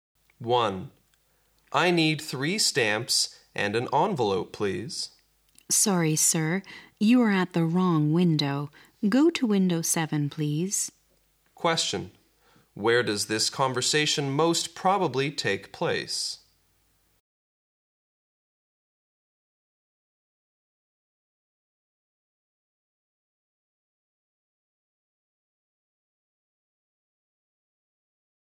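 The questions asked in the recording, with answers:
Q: Question. Where does this conversation most probably take place?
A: At a post office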